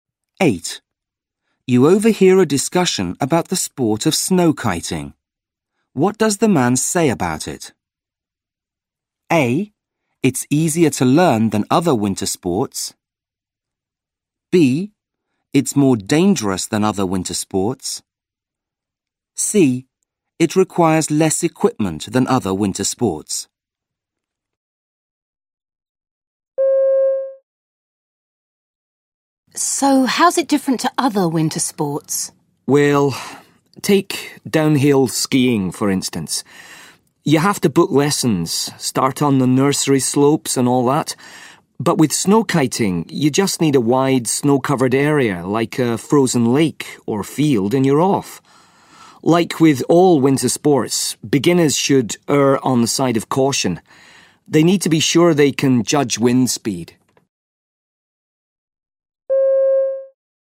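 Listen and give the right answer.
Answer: A: It's easier to learn than other winter sports.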